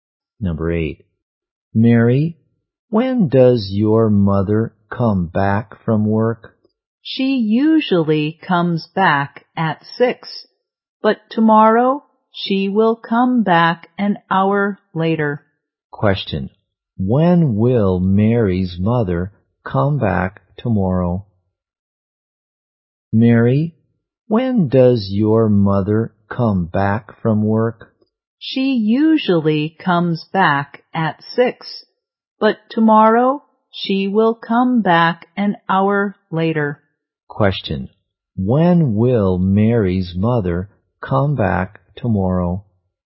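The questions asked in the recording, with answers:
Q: when will Mary's mother come back tomorrow?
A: At 7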